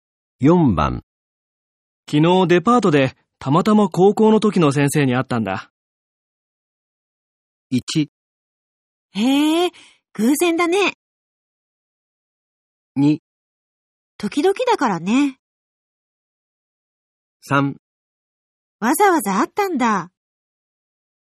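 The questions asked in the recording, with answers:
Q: 昨日デパートでたまたま高校の時の先生に会ったんだ。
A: 1: へえ、偶然だね。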